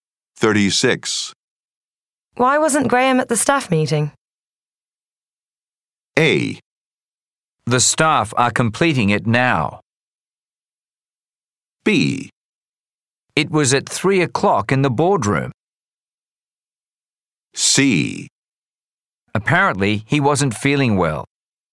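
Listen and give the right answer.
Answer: C: Apparently, he wasn't feeling well.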